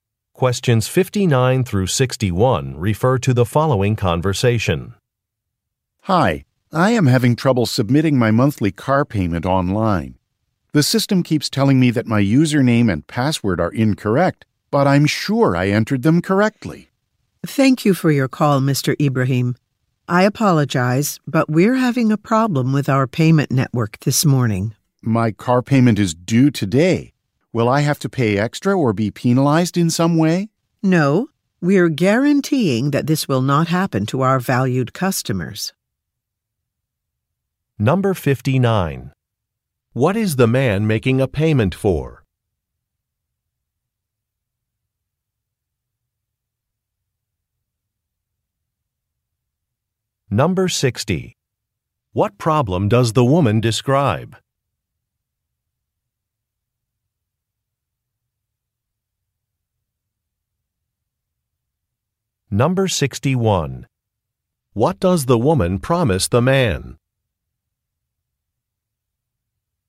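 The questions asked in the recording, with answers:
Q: What is the man making a payment for?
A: A car

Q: What problem does the woman describe?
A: A problem with the payment network

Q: What does the woman promise the man?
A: He will not be penalized or pay extra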